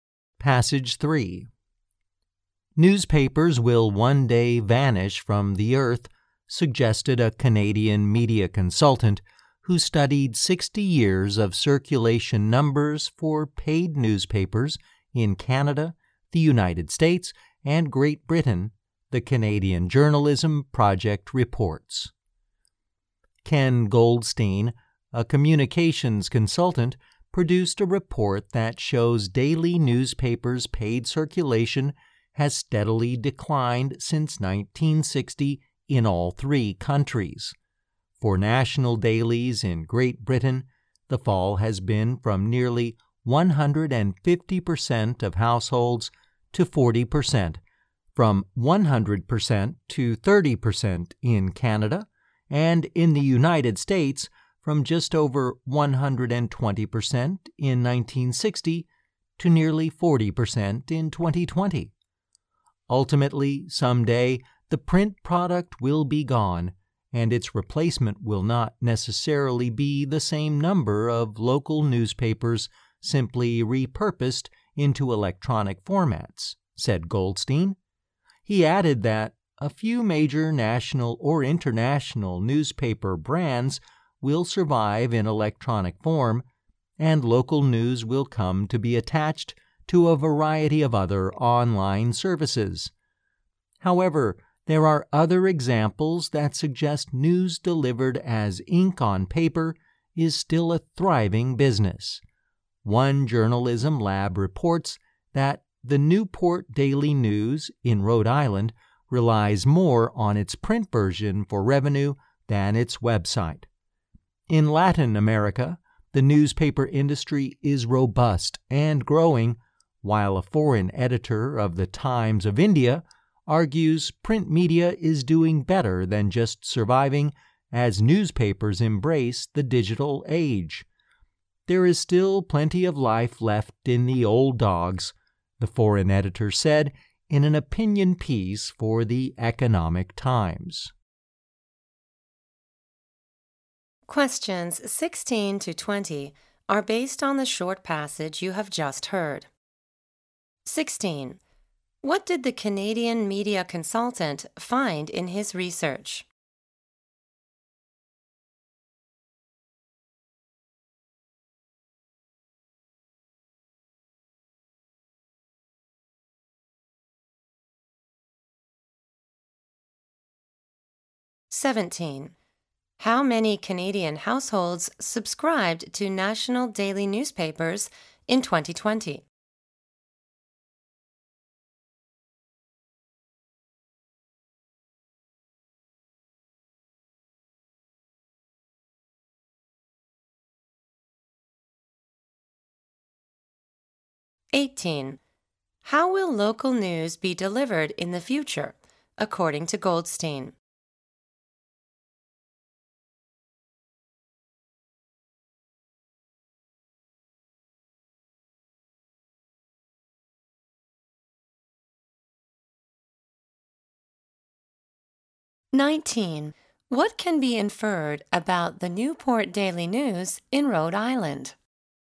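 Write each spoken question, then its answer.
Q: What did the Canadian media consultant find in his research?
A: The paid circulation of daily newspapers has steadily declined since 1960.

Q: How many Canadian households subscribed to national daily newspapers in 2020?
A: 30%

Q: How will local news be delivered in the future, according to Goldstein?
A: It will be attached to a variety of other online services.

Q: What can be inferred about the Newport Daily News in Rhode Island?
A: It relies more on its print version for revenue than on its website.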